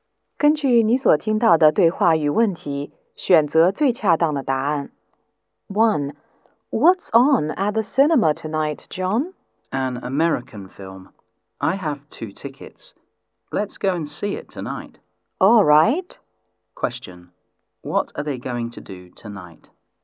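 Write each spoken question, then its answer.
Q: What are they going to do tonight?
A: See an American film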